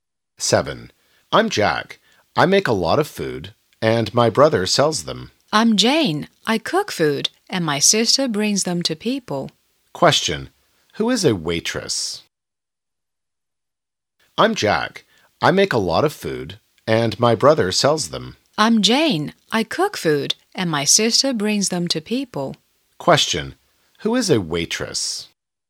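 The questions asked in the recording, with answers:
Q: Question. Who is a waitress?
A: Jane's sister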